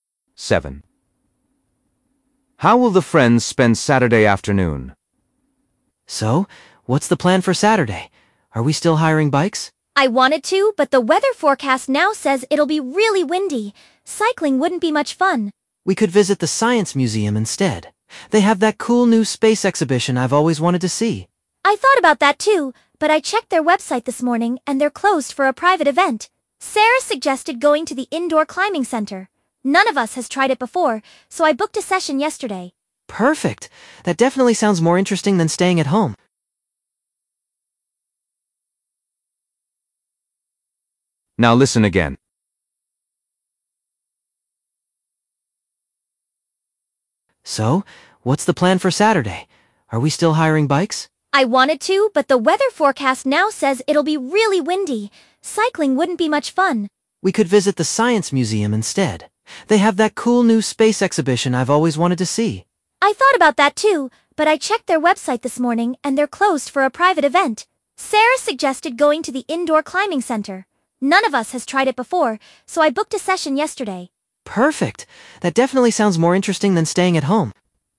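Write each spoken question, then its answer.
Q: How will the friends spend Saturday afternoon?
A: indoor climbing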